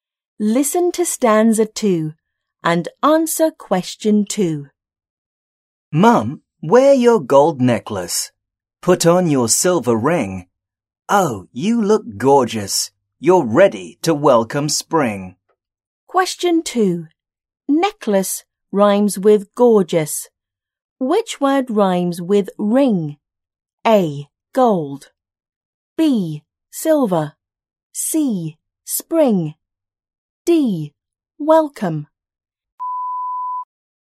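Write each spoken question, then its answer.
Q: Which word rhymes with ring?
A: C: Spring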